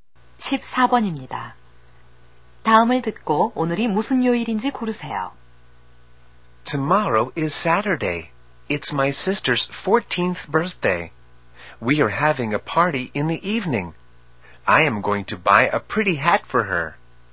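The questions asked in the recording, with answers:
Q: 다음을 듣고 오늘이 무슨 요일인지 고르세요.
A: 금요일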